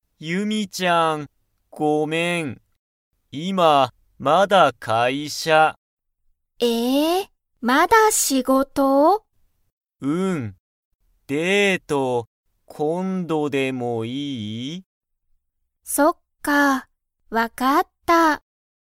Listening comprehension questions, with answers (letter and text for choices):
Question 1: タカシは、まだ____をしている。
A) 仕事しごと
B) デート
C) スマホ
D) ランニング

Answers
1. A) 仕事しごと

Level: Level 1